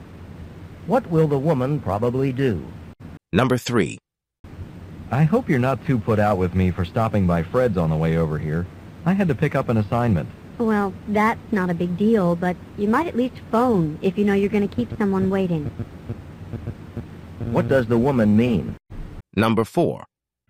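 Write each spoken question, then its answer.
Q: What does the woman mean?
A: The man should have phoned to say he would be late.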